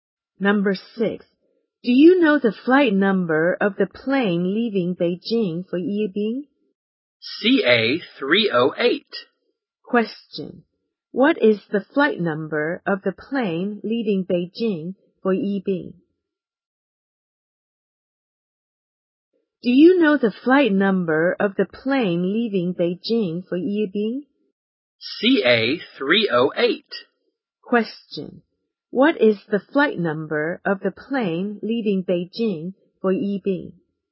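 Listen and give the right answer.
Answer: CA-308.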